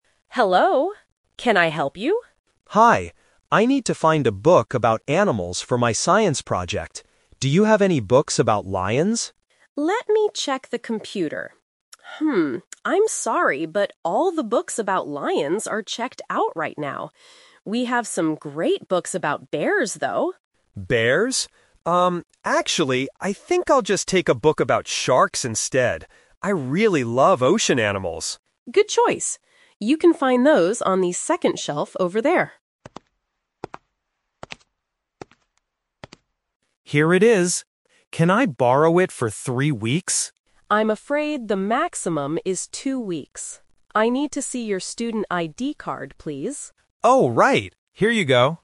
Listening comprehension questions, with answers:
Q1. What animal is Tom's book about?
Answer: Sharks

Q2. How long can Tom keep the library book?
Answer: Two weeks

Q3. What does the librarian ask Tom to show?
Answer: His student ID card

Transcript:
Librarian: Hello. Can I help you?
Tom: Hi. I need to find a book about animals for my science project. Do you have any books about lions?
Librarian: Let me check the computer. Hmm, I'm sorry, but all the books about lions are checked out right now. We have some great books about bears, though.
Tom: Bears? Um, actually, I think I'll just take a book about sharks instead. I really love ocean animals.
Librarian: Good choice. You can find those on the second shelf over there.
Tom: Here it is. Can I borrow it for three weeks?
Librarian: I'm afraid the maximum is two weeks.